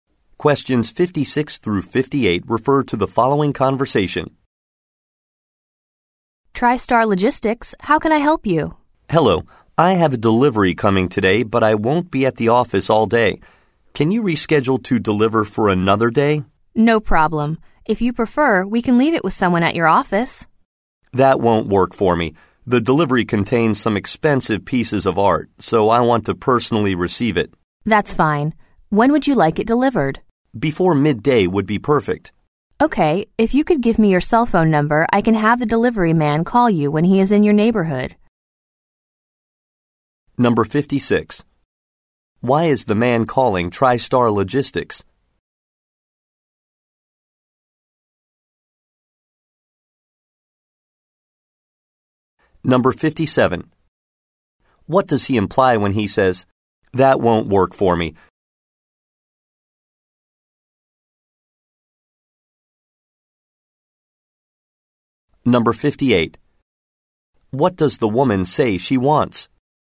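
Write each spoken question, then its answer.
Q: Why is the man calling TriStar Logistics?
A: To reschedule a delivery

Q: What does he imply when he says, That won't work for me?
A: He wants to receive the delivery personally

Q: What does the woman say she wants?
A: The man's cell phone number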